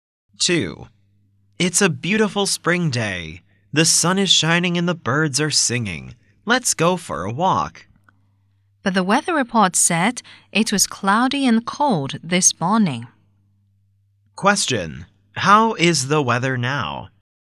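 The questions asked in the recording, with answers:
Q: How is the weather now?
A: Sunny and fine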